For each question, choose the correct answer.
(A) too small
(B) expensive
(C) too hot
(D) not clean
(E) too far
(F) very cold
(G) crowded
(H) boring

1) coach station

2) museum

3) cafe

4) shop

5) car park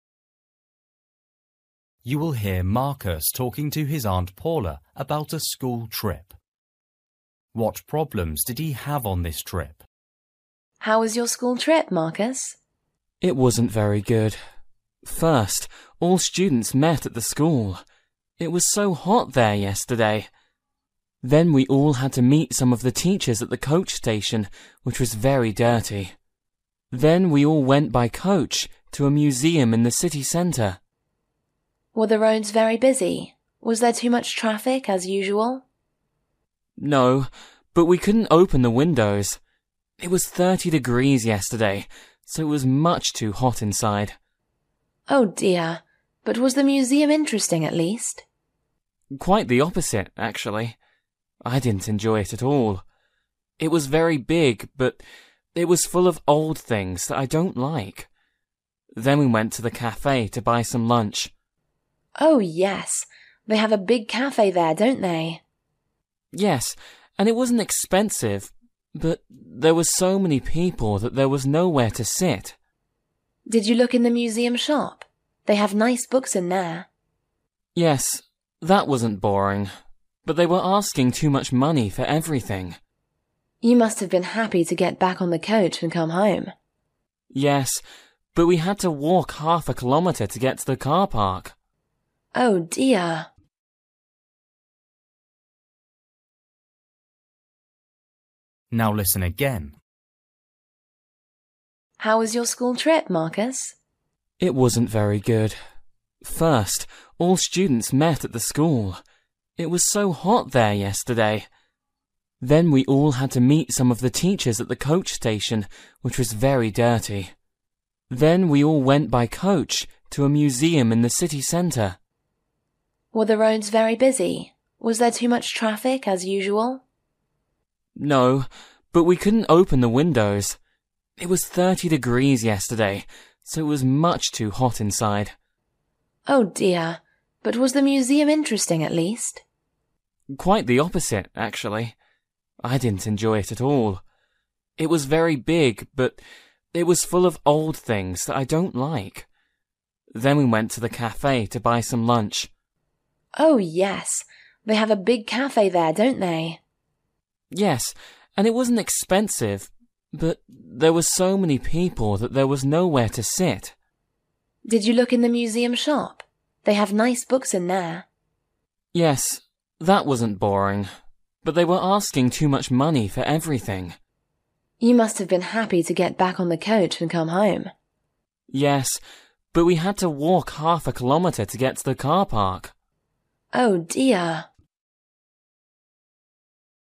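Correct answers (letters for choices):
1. D
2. H
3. G
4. B
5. E

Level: Luyện nghe trình độ A2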